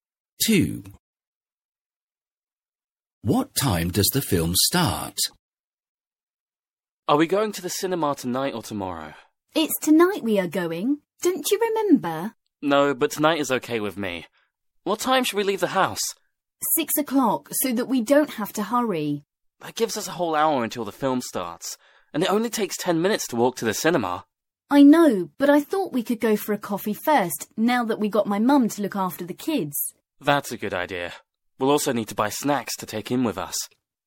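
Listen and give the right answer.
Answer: 7 o'clock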